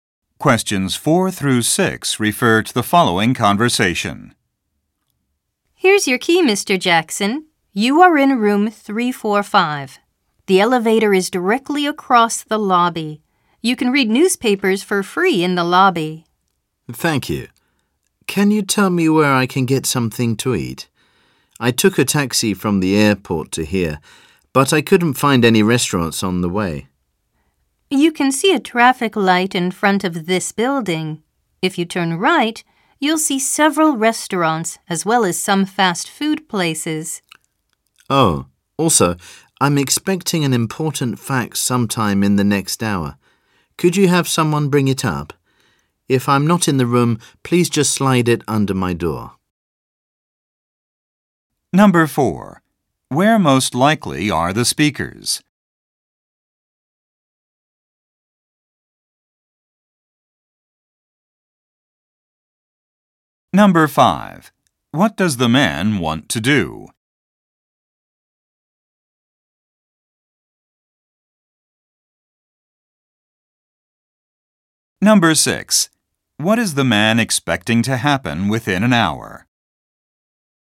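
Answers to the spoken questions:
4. At a hotel
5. Get something to eat
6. He will receive an important fax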